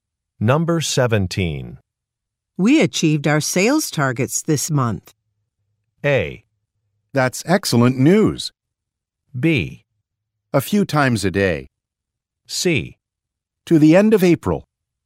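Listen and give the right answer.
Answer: A: That's excellent news.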